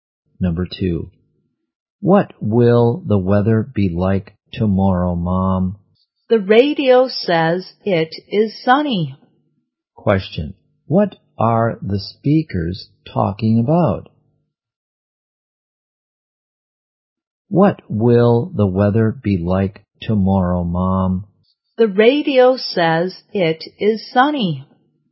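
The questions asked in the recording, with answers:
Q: what are the speakers talking about?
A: Tomorrow's weather.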